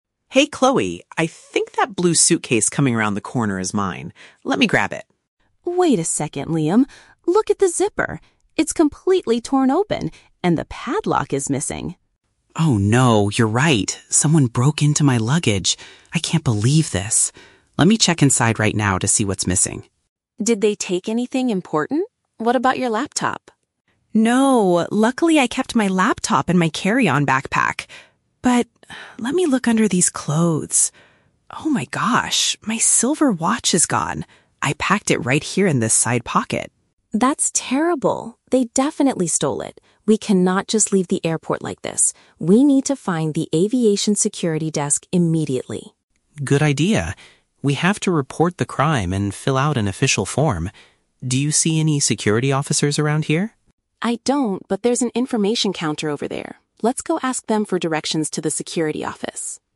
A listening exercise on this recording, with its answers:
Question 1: What exactly happened to Liam's suitcase?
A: Someone illegally forced it open to look inside.

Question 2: What did the thief manage to take from the luggage?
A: A silver accessory.

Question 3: What do they plan to do before leaving the airport?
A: Go to the official security office to make a formal complaint.

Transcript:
Liam: Hey Chloe, I think that blue suitcase coming around the corner is mine. Let me grab it.
Chloe: Wait a second, Liam. Look at the zipper. It's completely torn open, and the padlock is missing!
Liam: Oh no! You're right. Someone broke into my luggage. I can't believe this. Let me check inside right now to see what's missing.
Chloe: Did they take anything important? What about your laptop?
Liam: No, luckily I kept my laptop in my carry-on backpack. But... let me look under these clothes. Oh my gosh, my silver watch is gone! I packed it right here in this side pocket.
Chloe: That's terrible. They definitely stole it. We cannot just leave the airport like this. We need to find the aviation security desk immediately.
Liam: Good idea. We have to report the crime and fill out an official form. Do you see any security officers around here?
Chloe: I don't, but there's an information counter over there. Let's go ask them for directions to the security office.